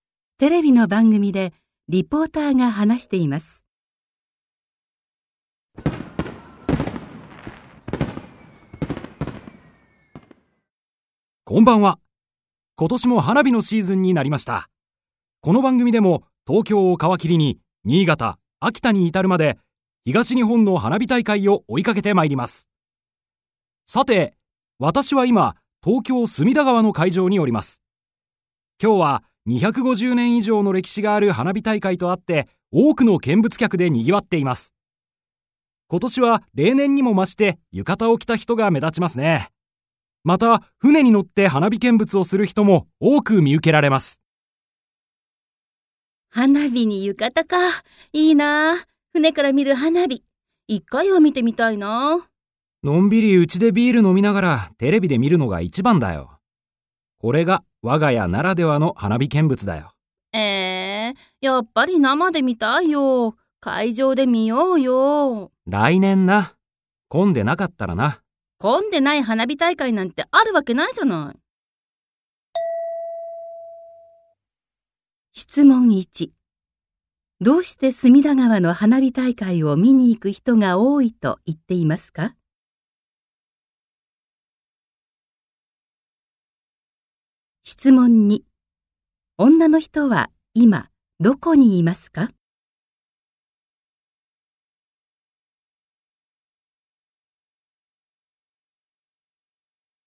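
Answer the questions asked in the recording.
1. 250年以上の歴史がある花火大会だから
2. 家(うちでテレビを見ている)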